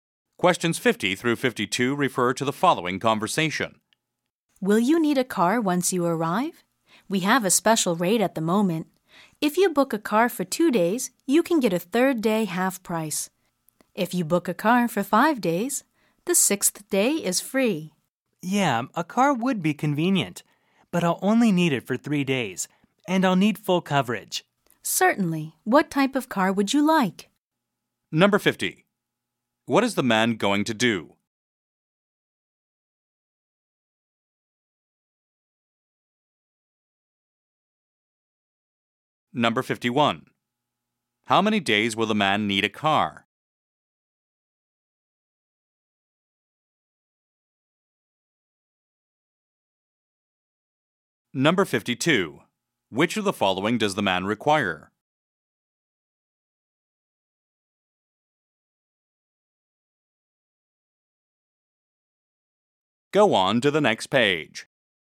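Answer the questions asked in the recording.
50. Rent a car
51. Three
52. Full coverage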